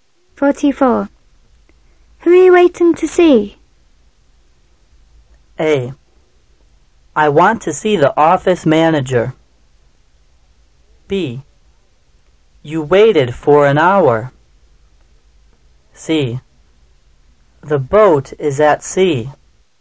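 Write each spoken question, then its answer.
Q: Who are you waiting to see?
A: A: I want to see the office manager.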